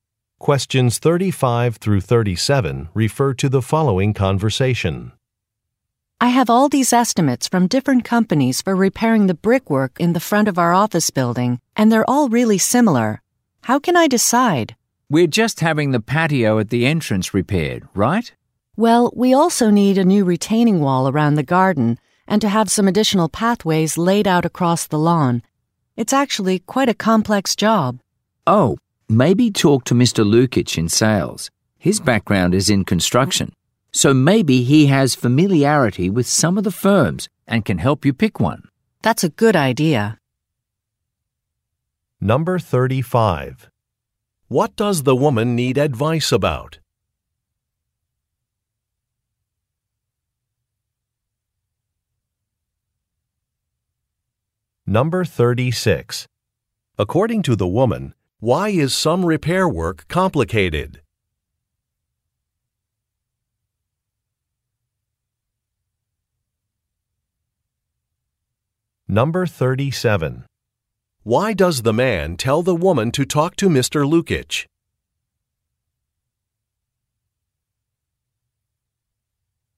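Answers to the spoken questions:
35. Choosing a company to repair the brickwork
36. It also includes a new retaining wall and additional pathways
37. He has a construction background and may know the firms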